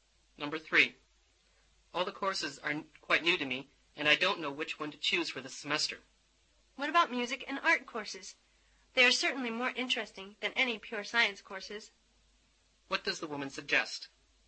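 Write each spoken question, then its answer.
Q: What does the woman suggest?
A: Taking music and art courses.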